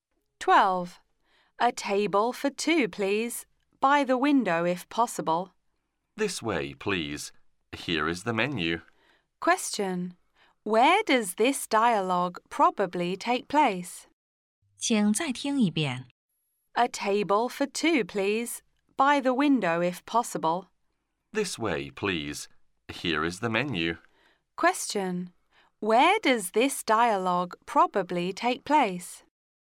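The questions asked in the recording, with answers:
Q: Where does this dialogue probably take place?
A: In a restaurant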